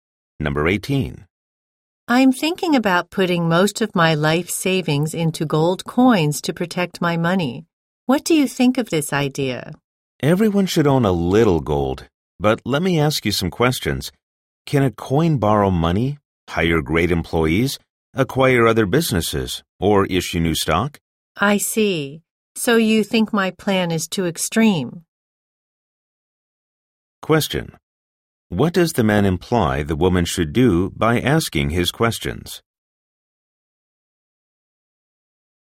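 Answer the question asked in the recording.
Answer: Invest in businesses or stocks rather than mostly gold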